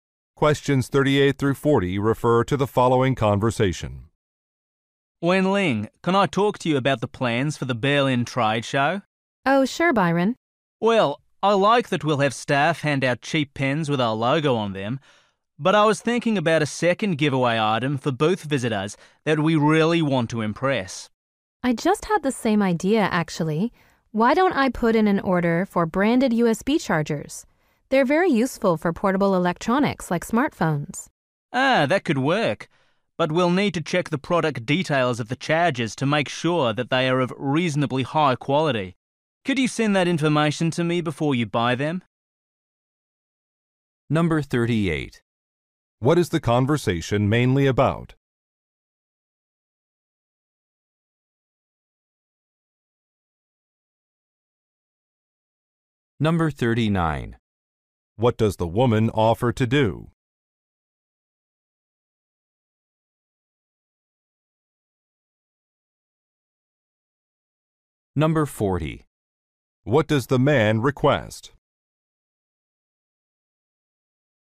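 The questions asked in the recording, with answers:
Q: What is the conversation mainly about?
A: Giveaway items for a trade show

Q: What does the woman offer to do?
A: Order branded USB chargers

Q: What does the man request?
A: Product details of the chargers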